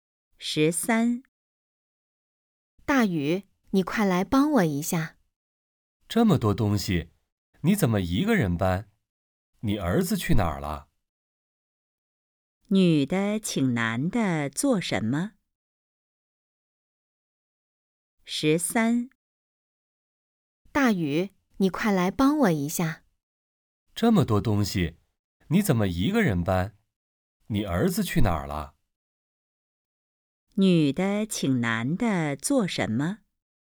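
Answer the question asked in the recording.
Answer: 帮她搬东西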